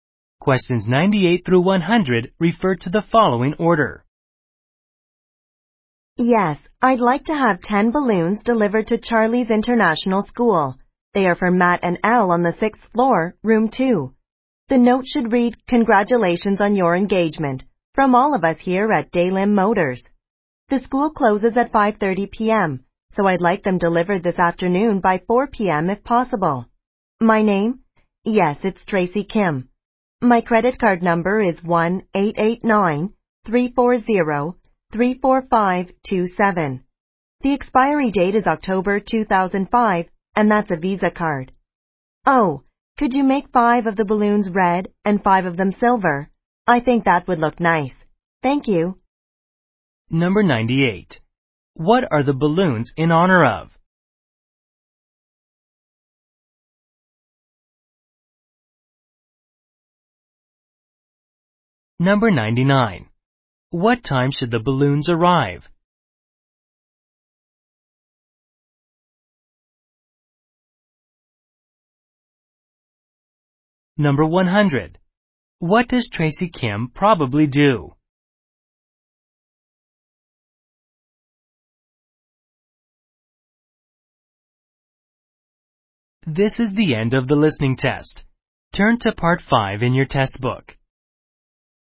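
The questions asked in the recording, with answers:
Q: What are the balloons in honor of?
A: An engagement

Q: What time should the balloons arrive?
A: By 4 p.m.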